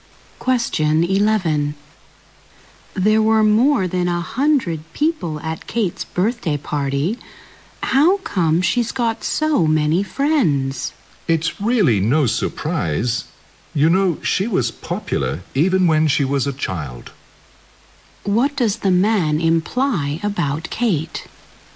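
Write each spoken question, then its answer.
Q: What does the man imply about Kate?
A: She has always been popular, even as a child.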